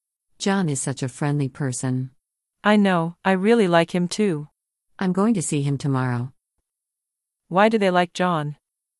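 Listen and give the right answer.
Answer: He is very friendly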